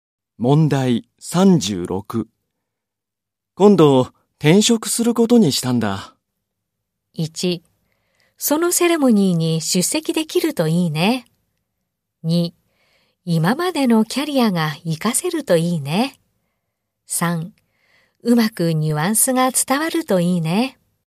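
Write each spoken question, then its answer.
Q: 今度転職することにしたんだ。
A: 2: 今までのキャリアが活かせるといいね。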